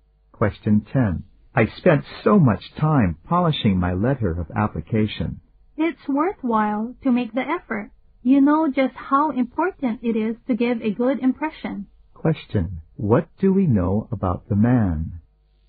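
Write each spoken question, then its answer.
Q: What do we know about the man?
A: He worked hard on his application letter to make a good impression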